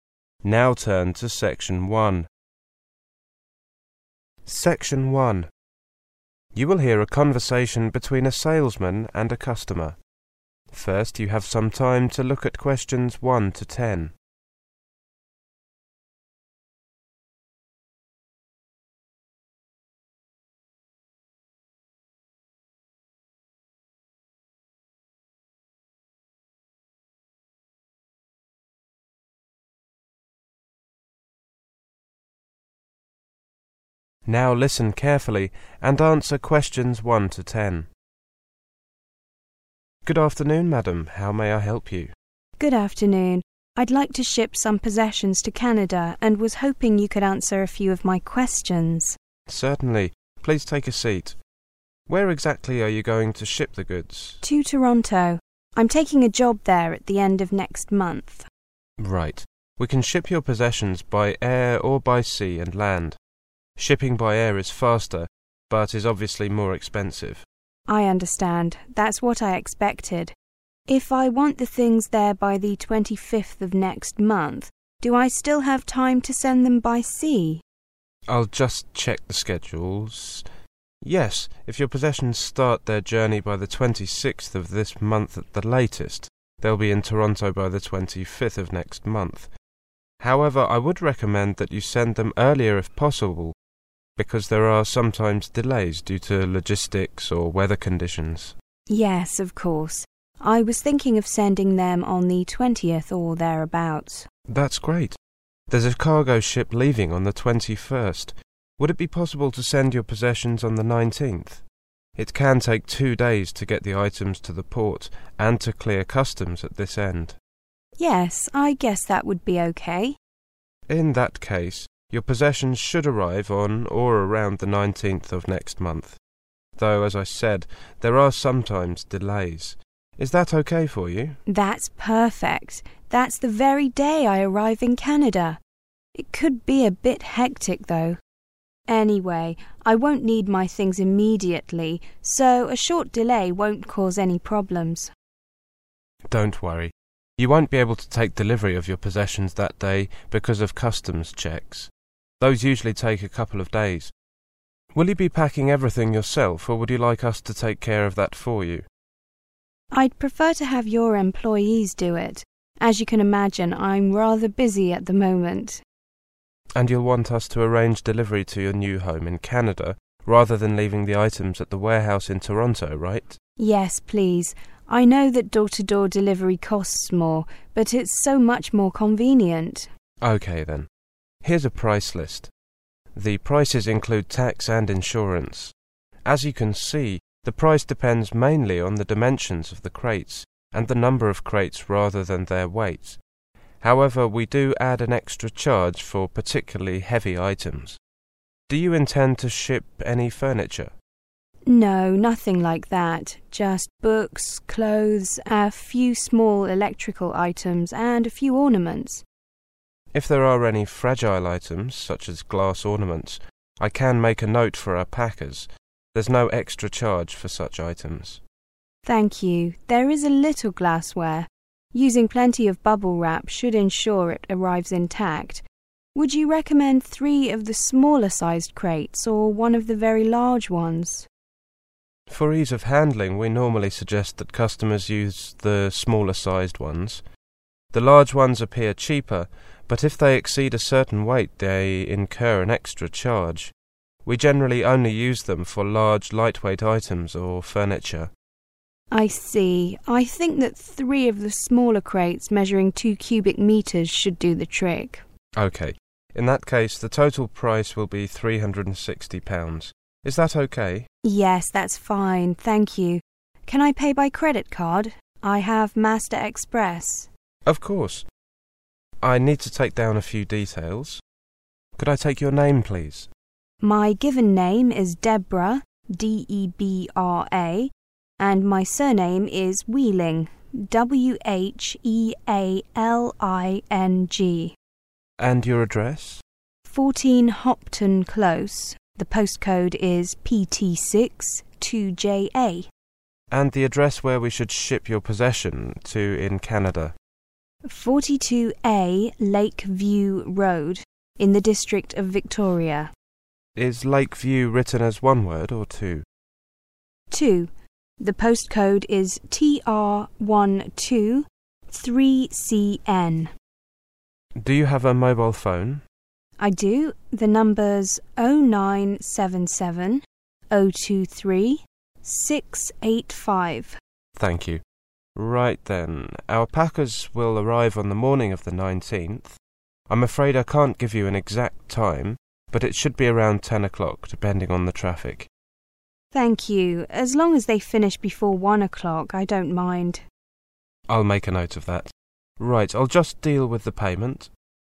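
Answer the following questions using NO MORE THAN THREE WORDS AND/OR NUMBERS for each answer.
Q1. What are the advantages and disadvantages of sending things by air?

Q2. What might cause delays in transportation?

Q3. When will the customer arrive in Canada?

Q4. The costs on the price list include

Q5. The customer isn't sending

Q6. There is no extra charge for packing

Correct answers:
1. faster, more expensive
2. logistics or weather conditions
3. 19th of next month
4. tax and insurance
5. furniture
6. fragile items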